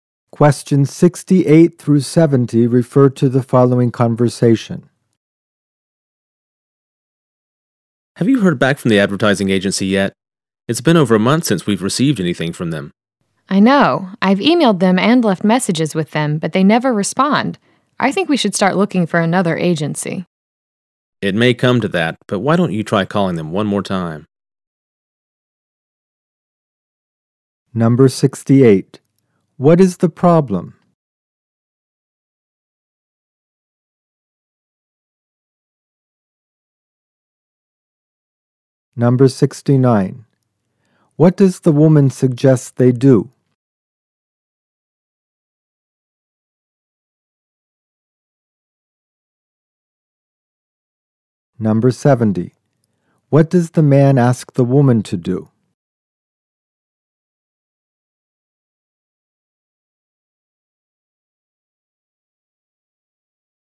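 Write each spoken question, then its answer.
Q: What is the problem?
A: The advertising agency has not responded for over a month.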